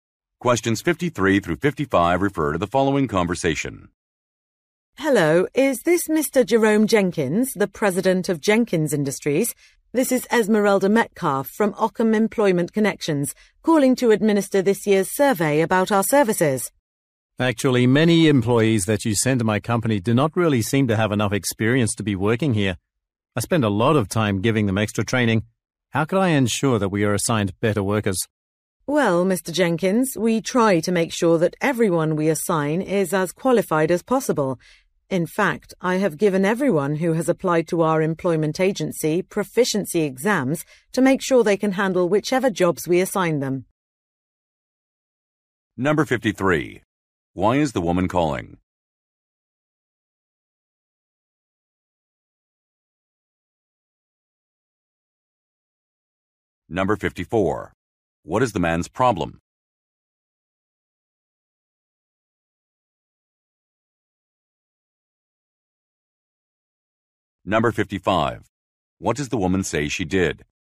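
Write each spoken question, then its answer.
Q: Why is the woman calling?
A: To do a survey about her agency's services

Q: What is the man's problem?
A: The workers sent to him lack experience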